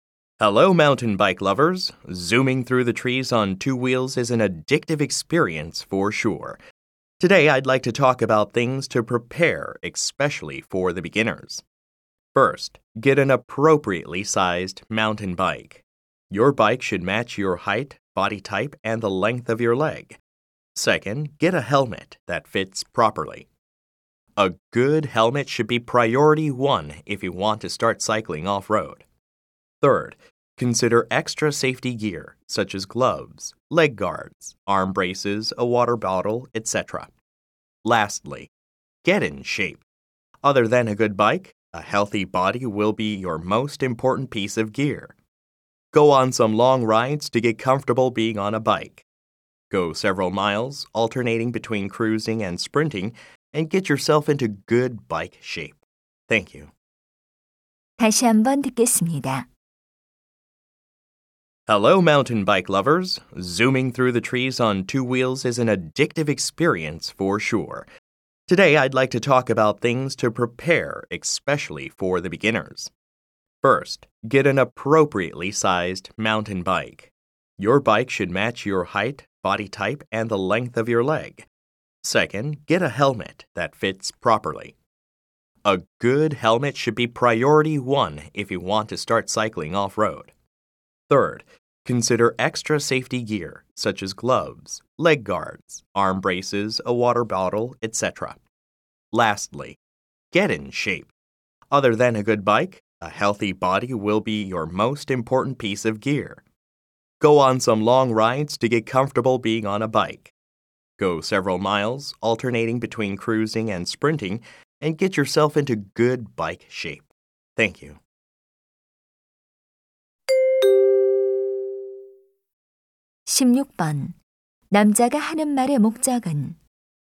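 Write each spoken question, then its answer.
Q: 남자가 하는 말의 목적은?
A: 초보자를 위한 산악자전거 준비 사항을 안내하려고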